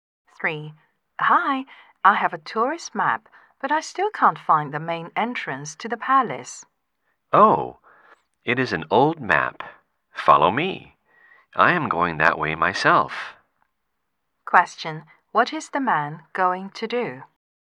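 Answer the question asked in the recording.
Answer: Show the woman the way to the palace entrance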